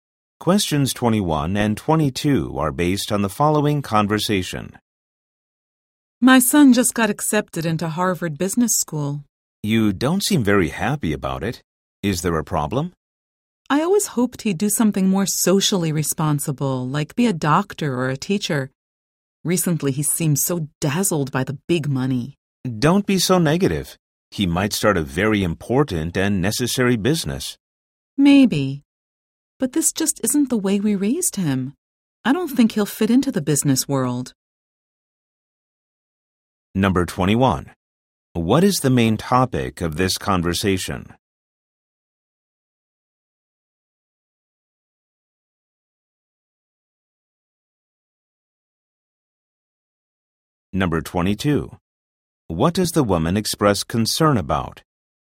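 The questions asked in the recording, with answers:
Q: What is the main topic of this conversation?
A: The woman's son getting into business school

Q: What does the woman express concern about?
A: Her son is dazzled by money and not socially responsible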